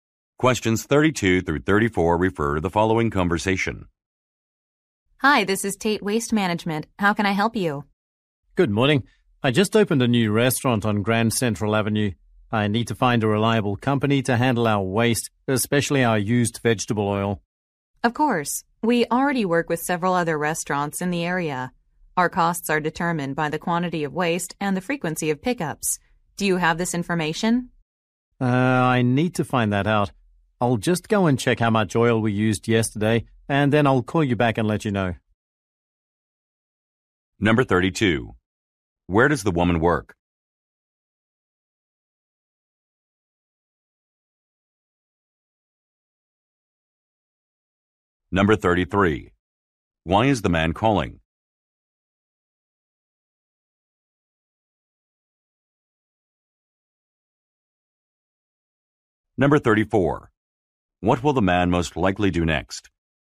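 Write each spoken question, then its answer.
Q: Where does the woman work?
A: At a waste management company

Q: Why is the man calling?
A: To find a company to handle his new restaurant's waste

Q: What will the man most likely do next?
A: Check how much oil was used yesterday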